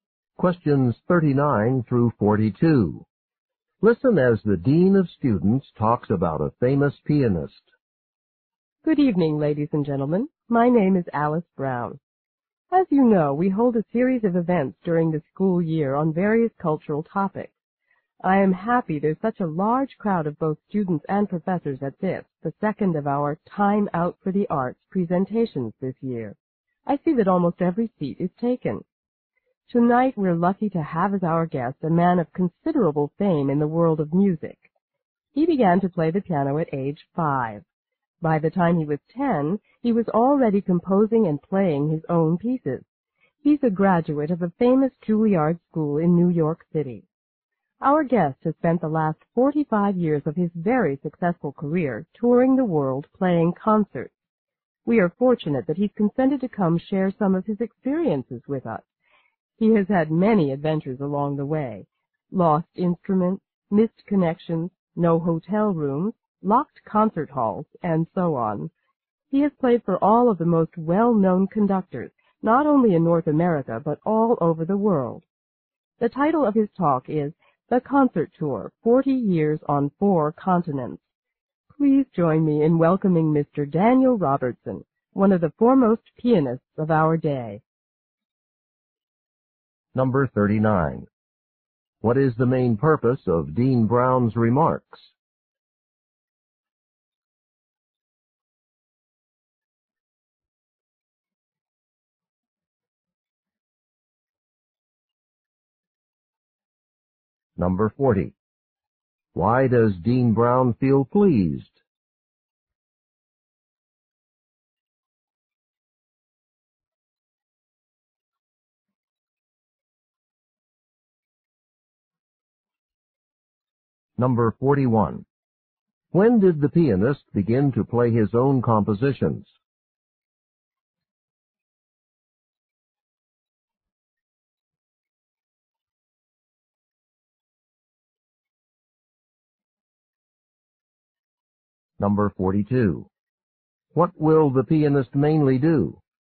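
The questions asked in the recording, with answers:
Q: What is the main purpose of Dean Brown's remarks?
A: To introduce a guest pianist

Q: Why does Dean Brown feel pleased?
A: A large crowd has come

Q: When did the pianist begin to play his own compositions?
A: By age 10

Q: What will the pianist mainly do?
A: Talk about his experiences on concert tours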